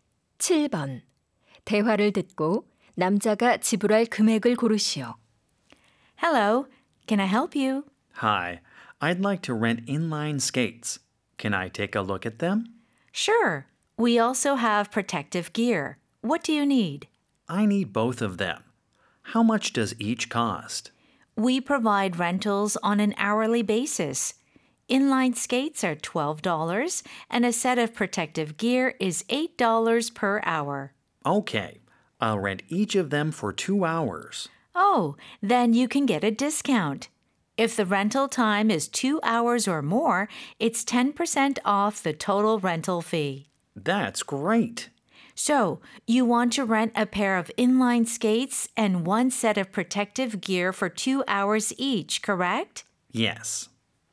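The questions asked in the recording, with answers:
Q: 대화를 듣고 남자가 지불할 금액을 고르시오.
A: 36달러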